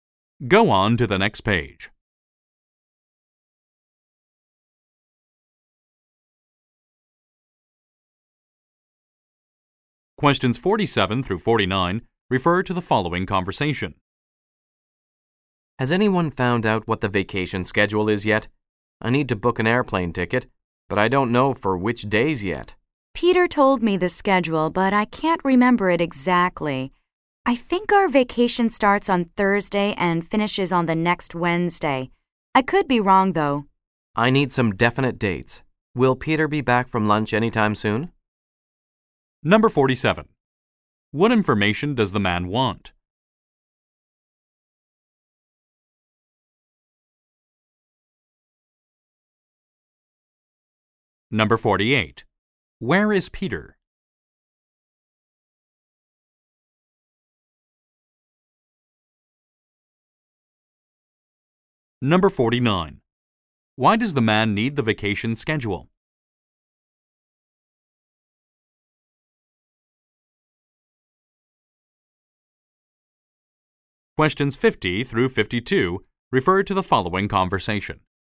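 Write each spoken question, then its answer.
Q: What information does the man want?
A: The vacation schedule dates

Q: Where is Peter?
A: At lunch

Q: Why does the man need the vacation schedule?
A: To book an airplane ticket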